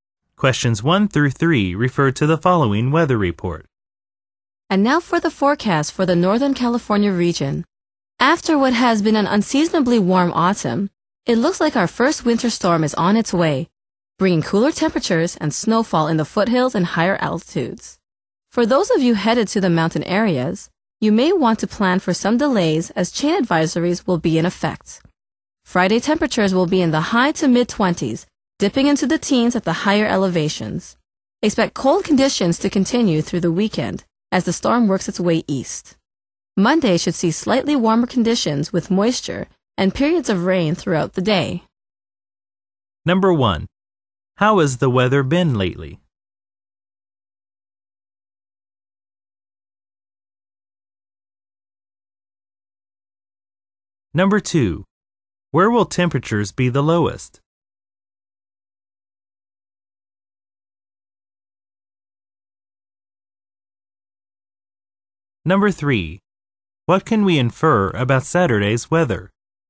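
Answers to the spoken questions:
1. Unseasonably warm
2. At the higher elevations
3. It will be cold, as the storm works its way east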